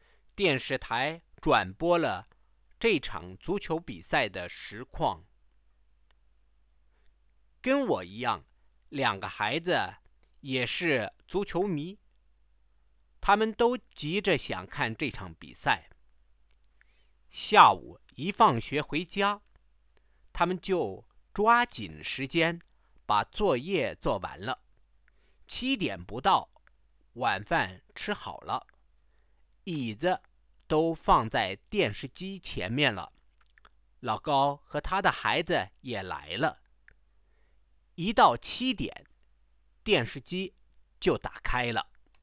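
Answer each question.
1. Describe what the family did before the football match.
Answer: As soon as the children got home from school they finished their homework. Dinner was over before seven and the chairs were set in front of the TV. Lao Gao and his children came, and the TV was switched on at seven.

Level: 2nd year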